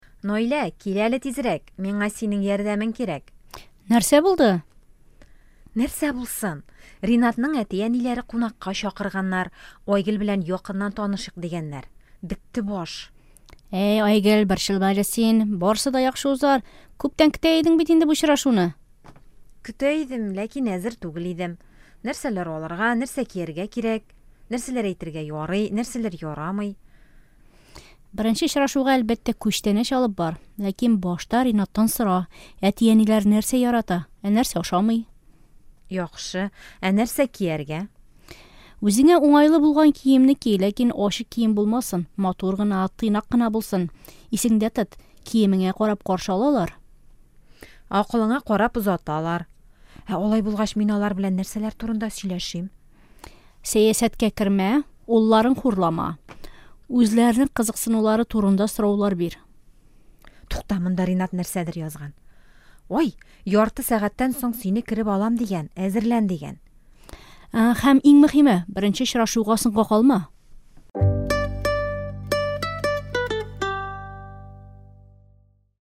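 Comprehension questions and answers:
Бирем. Проверьте понимание диалога, ответив на вопросы "Әйе" или "Юк":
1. Айгөл беренче тапкыр Ренат белән очрашуга бара.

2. Беренче очрашуга күчтәнәч алып барырга кирәк.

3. Наилә ачык кием кияргә киңәш итә.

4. Беренче очрашуда сәясәт турында сөйләшергә кирәк түгел.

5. Ренат тиздән киләчәк.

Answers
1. Юк
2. Әйе
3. Юк
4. Әйе
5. Әйе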